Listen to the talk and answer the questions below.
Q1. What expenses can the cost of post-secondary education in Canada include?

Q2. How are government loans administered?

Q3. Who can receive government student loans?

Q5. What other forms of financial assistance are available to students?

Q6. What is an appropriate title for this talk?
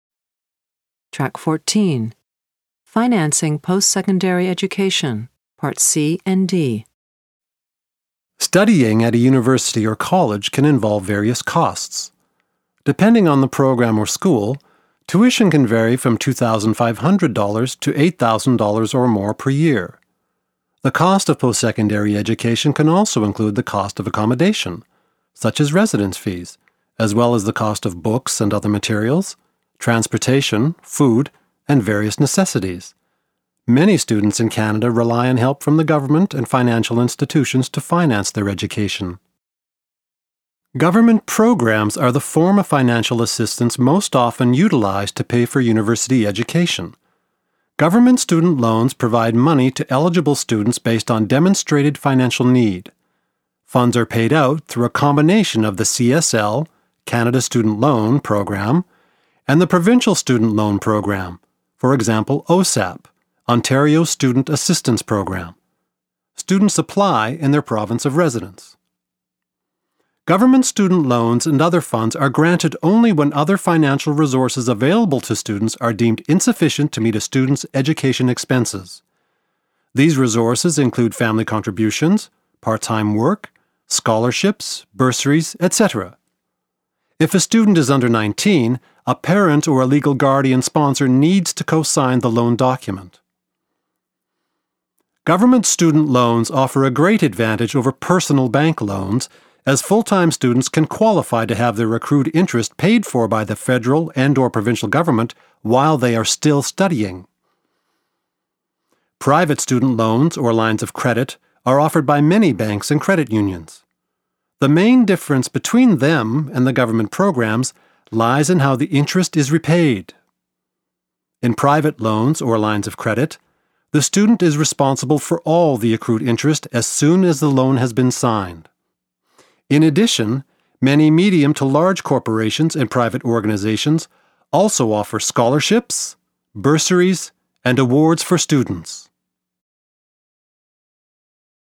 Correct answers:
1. They include tuition, accommodation fee: residence fees, the cost of books and materials, transportation, food, various necessity.
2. CCL program and provincial student loan: OSAP
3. When other financial resources available to students are deemed insufficient to meet a student's education expenses.
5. Many medium to large corporations and private organizations also offer scholarships, bursaries and awards for students.
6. Financing Post-Secondary Education